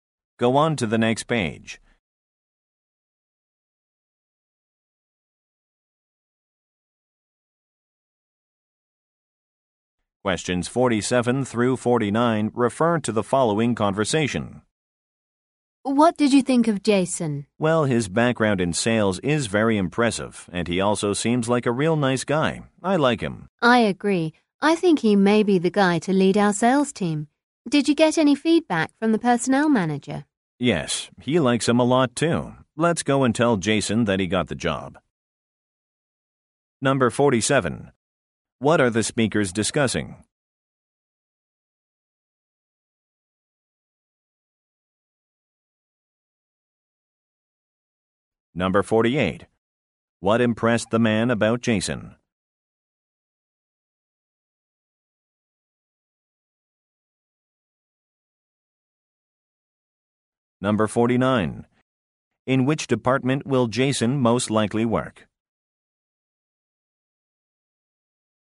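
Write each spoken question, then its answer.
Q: What are the speakers discussing?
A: Hiring Jason (a job candidate)

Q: What impressed the man about Jason?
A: His background in sales

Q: In which department will Jason most likely work?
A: Sales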